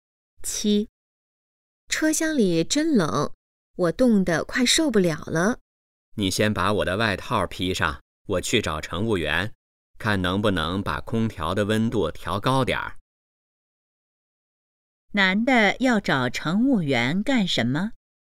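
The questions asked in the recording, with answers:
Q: 男的要找乘务员干什么?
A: 把空调温度调高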